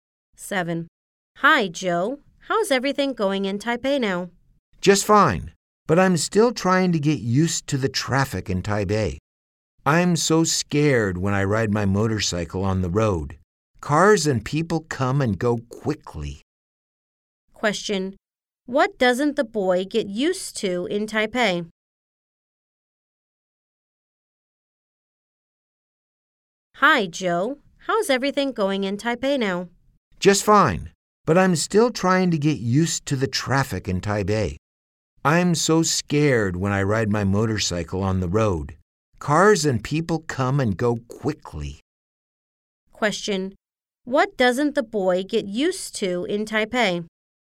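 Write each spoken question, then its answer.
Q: What doesn't the boy get used to in Taipei?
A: The traffic in Taipei.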